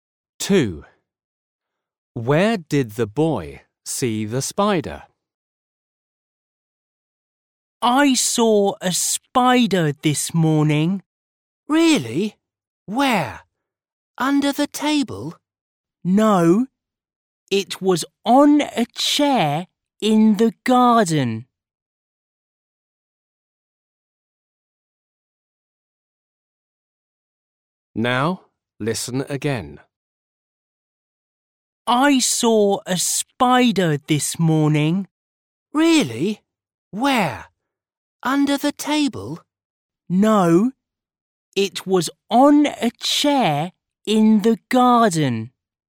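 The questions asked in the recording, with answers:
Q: Where did the boy see the spider?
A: on a chair in the garden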